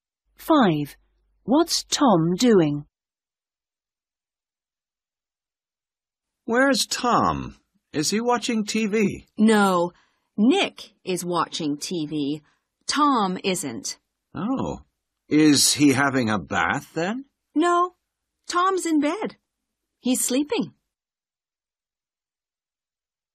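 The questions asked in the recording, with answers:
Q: What's Tom doing?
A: Sleeping in bed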